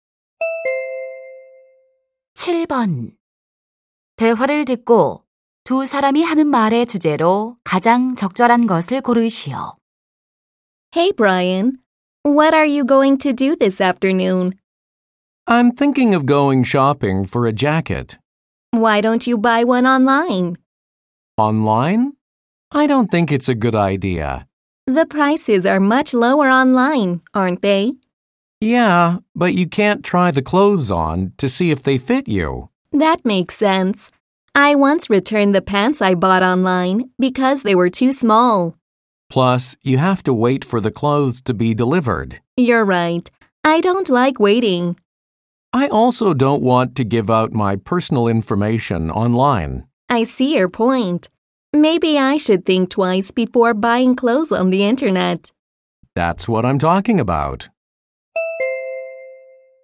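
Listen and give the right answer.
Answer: 온라인 의류 구매의 단점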